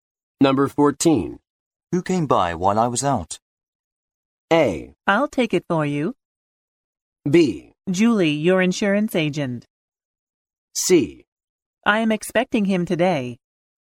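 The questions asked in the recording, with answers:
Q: Who came by while I was out?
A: B: Julie, your insurance agent.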